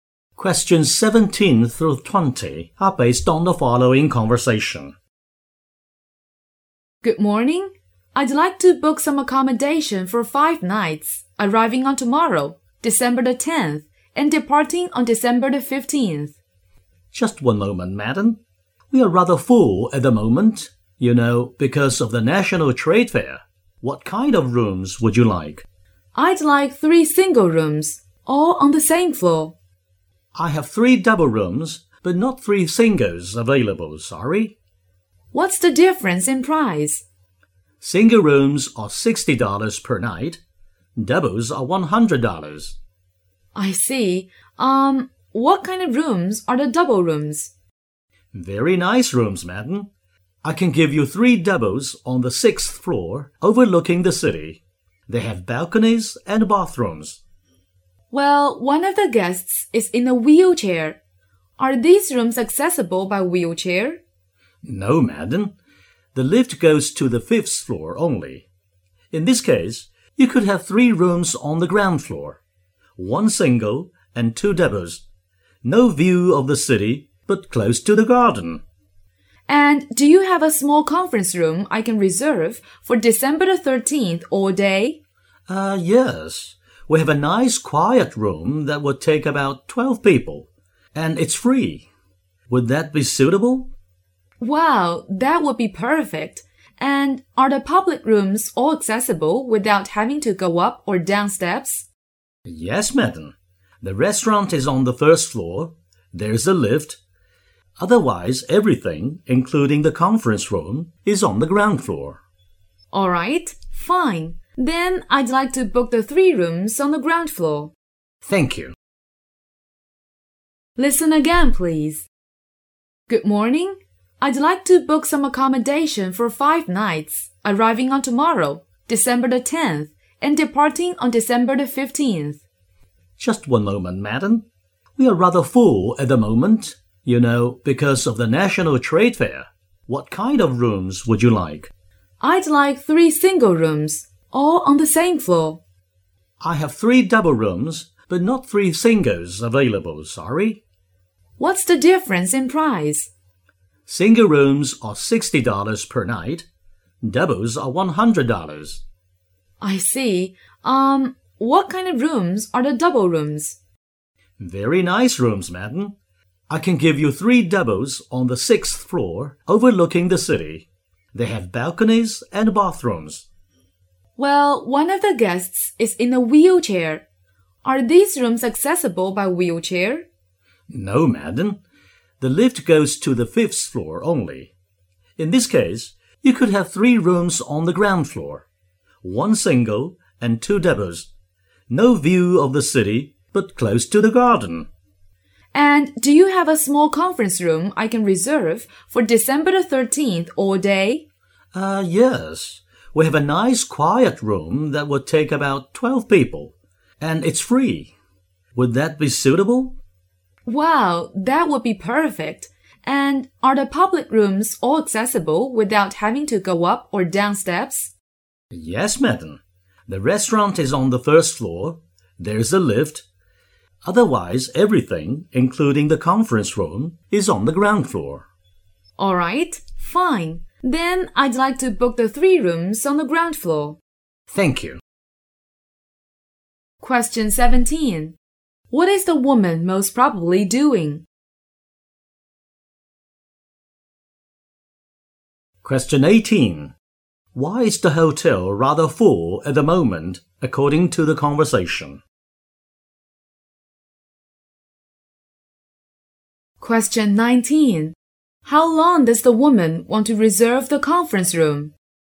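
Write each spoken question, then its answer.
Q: What is the woman most probably doing?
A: Booking hotel rooms

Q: Why is the hotel rather full at the moment, according to the conversation?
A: Because of the National Trade Fair

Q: How long does the woman want to reserve the conference room?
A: All day (on December 13th)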